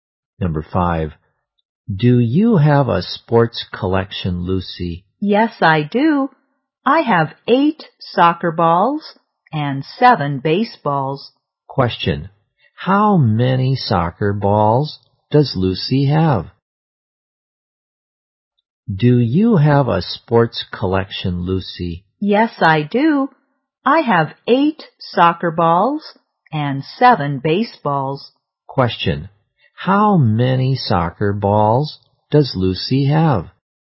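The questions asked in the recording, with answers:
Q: Question, how many soccer balls does Lucy have?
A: Eight.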